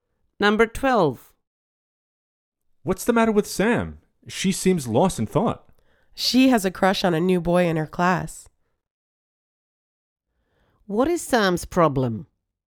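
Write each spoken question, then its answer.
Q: What is Sam's problem?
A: She has a crush on a new boy in her class.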